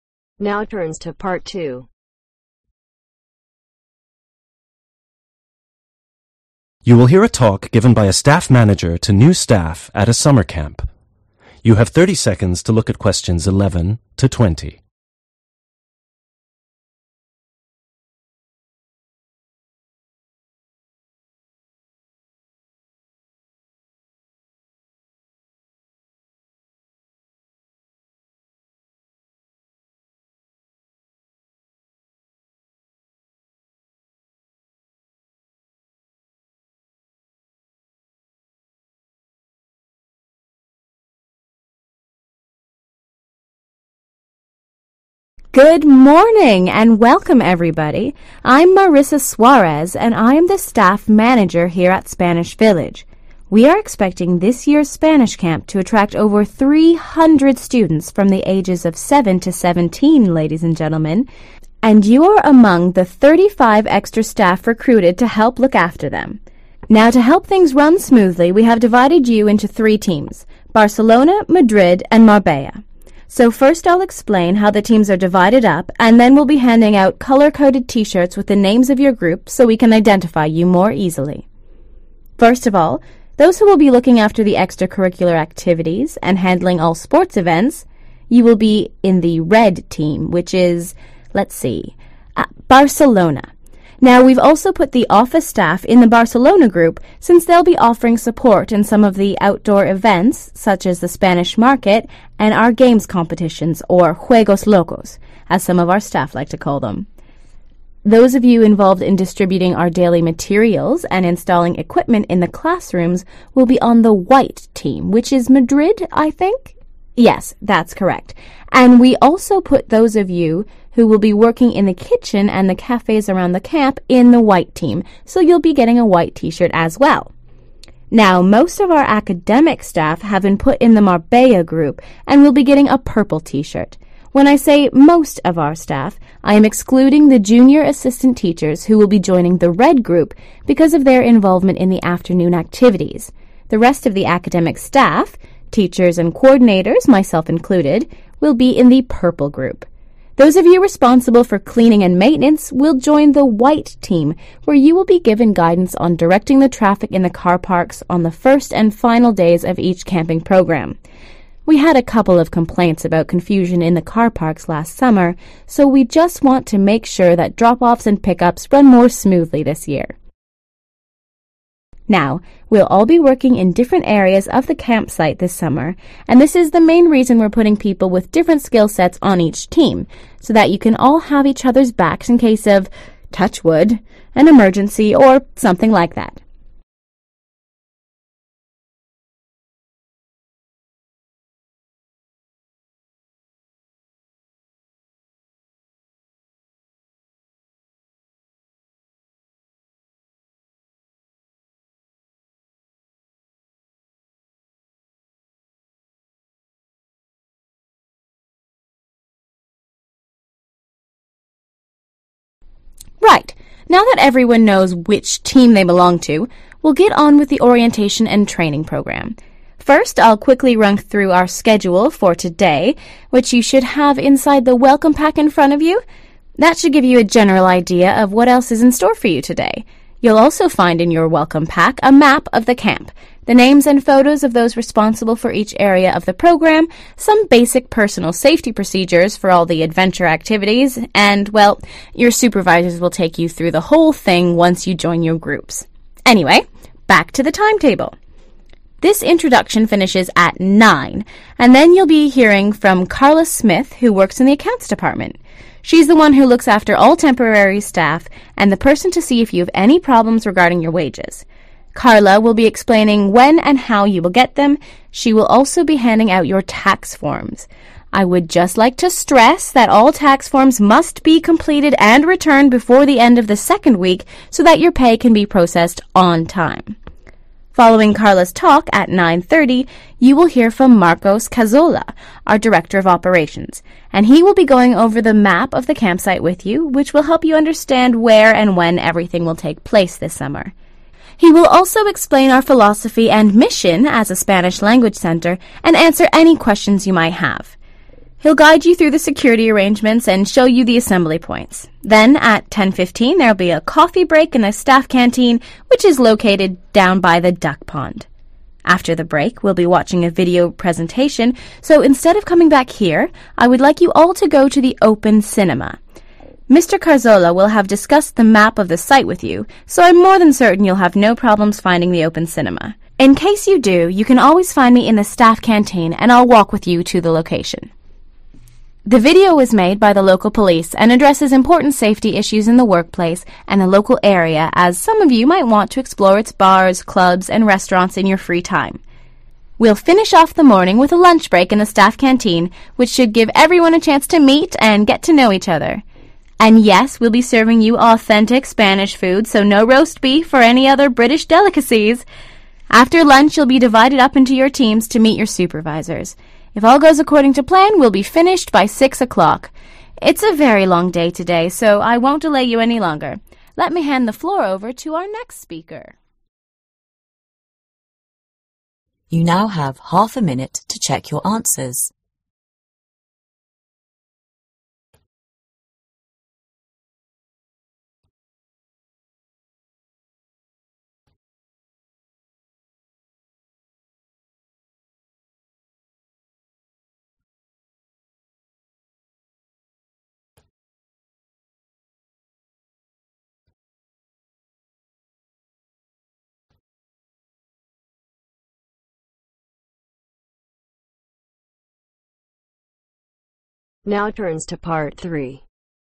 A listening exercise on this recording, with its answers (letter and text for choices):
Choose THREE staff from the box and write the correct letter A-D next to questions 11-13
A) Cleaning and maintenance staff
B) Office staff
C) The speaker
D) Mr Cazorla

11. Barcelona ................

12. Madrid ................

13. Marbella .................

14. Information on the people 14 ..............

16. 09.00 – Carla Smith from 16 .............. will be explaining employee payment and handing out tax forms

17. 09.30 – Marcos Cazorla: Director 17 ............... will go through the campus and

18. 18 ................ and take you to the assembly points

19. 10.45 – Video presentation at the Open Cinema, which was created by the 19................ and will explain safety procedures for the workplace as well as the local area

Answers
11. B) Office staff
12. A) Cleaning and maintenance staff
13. C) The speaker
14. responsible
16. (the) accounts department
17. of Operations
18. security arrangements
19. (local) police